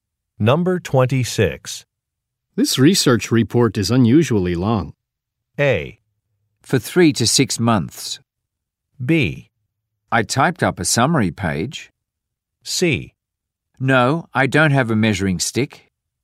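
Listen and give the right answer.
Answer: B: I typed up a summary page.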